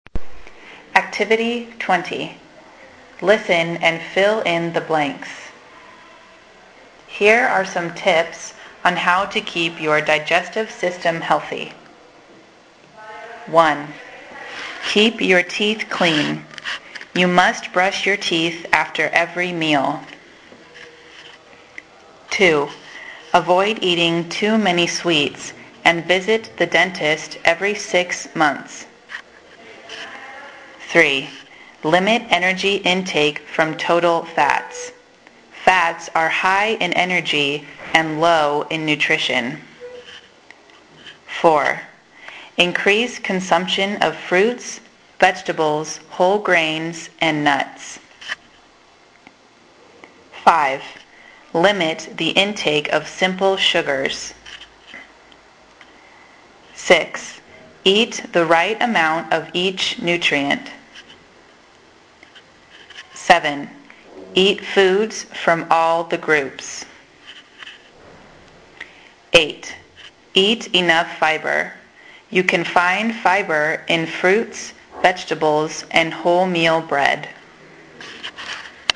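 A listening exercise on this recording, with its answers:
Activity 9. Listen and fill in the blanks. Read tips on how to maintain a healthy digestive system.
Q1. Keep your ___________ clean. You must ___________ your teeth after every meal.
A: teeth; brush

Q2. Avoid eating too many sweets and visit the __________________ every six months.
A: dentist

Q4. Increase consumption of __________, vegetables, whole grains and ________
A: fruits; nuts

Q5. Limit the intake of simple _____________.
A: sugars

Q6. Eat the right amount of each _____________.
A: nutrient

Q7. Eat foods from all the _______________.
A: groups

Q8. Eat enough ______________. You can find fibre in fruits, ____________ and wholemeal bread.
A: fibre; vegetables

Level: 5o de Primaria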